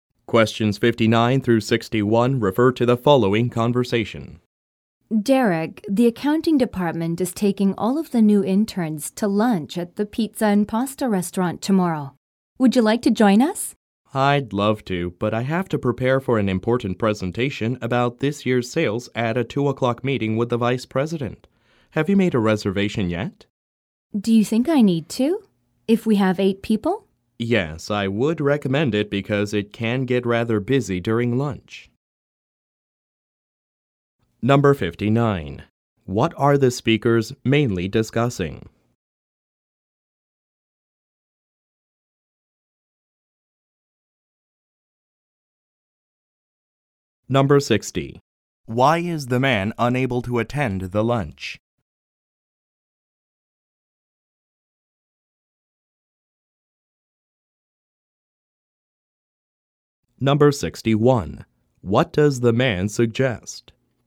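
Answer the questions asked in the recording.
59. A lunch for new interns at a pizza and pasta restaurant
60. He has to prepare for a sales presentation at a meeting with the vice president
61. Making a reservation at the restaurant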